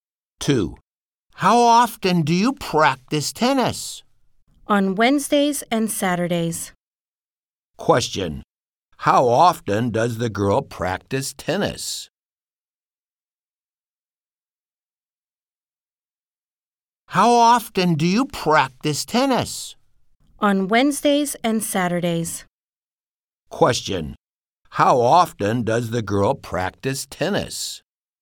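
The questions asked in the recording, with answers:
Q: Question.How often does the girl practice tennis?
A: On Wednesdays and Saturdays (twice a week).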